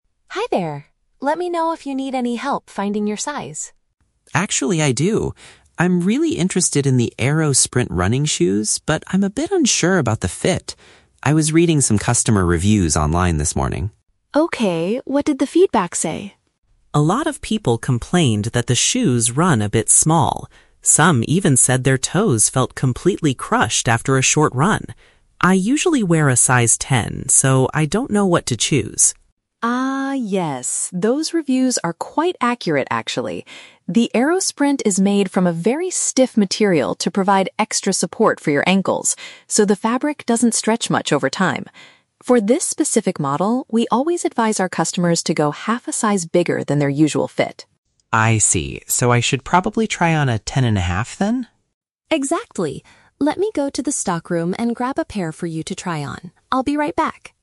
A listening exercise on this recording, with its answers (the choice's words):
Listen to a conversation between a customer and a shoe store clerk. Choose the correct answer (A, B, or C).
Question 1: What did the customer learn from the online reviews?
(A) The shoes do not provide enough ankle support.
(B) The shoes are smaller than the standard size.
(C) The shoes fall apart after a short run.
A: The shoes are smaller than the standard size.

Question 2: Why do these specific shoes feel tight on the feet?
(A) Because they are made of a material that does not stretch.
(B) Because they have very thick and heavy soles.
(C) Because the store accidentally ordered the wrong sizes.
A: Because they are made of a material that does not stretch.

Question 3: What does the clerk suggest the customer should do?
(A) Wait for the shoes to stretch out naturally.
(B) Look for a completely different shoe model.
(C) Try on a size ten and a half.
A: Try on a size ten and a half.

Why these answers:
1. Tom mentions that the online reviews said the shoes "run a bit small". "Smaller than the standard size" is a B1 paraphrase for "run small". The Trap: Option (A) is a trap. The clerk mentions the shoes provide "extra support for your ankles," so they do provide enough support. Option (C) uses the phrase "after a short run" from the audio, but the reviewers complained about their toes feeling crushed, not the shoes falling apart.
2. Sarah explains that the shoes are made from a "very stiff material" and the fabric "doesn't stretch much". The Trap: Option (B) is a logical guess for sports shoes, but heavy soles are never mentioned. Option (C) is incorrect because the tightness is a design feature, not a mistake made by the store.
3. Sarah advises going "half a size bigger". Since Tom's normal size is a ten, half a size bigger is a "ten and a half," which Tom confirms and Sarah agrees to fetch. The Trap: Option (A) is the exact opposite of the audio (The Trap of Contradiction); Sarah specifically notes that the fabric doesn't stretch much. Option (B) is a common alternative in real life, but the clerk simply gets him a larger size of the same model.

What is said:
Sarah: Hi there! Let me know if you need any help finding your size.
Tom: Actually, I do. I'm really interested in the Aero-Sprint running shoes, but I'm a bit unsure about the fit. I was reading some customer reviews online this morning.
Sarah: Okay, what did the feedback say?
Tom: A lot of people complained that the shoes run a bit small. Some even said their toes felt completely crushed after a short run. I usually wear a size ten, so I don't know what to choose.
Sarah: Ah, yes. Those reviews are quite accurate, actually. The Aero-Sprint is made from a very stiff material to provide extra support for your ankles, so the fabric doesn't stretch much over time. For this specific model, we always advise our customers to go half a size bigger than their usual fit.
Tom: I see. So I should probably try on a ten and a half, then?
Sarah: Exactly. Let me go to the stockroom and grab a pair for you to try on. I'll be right back!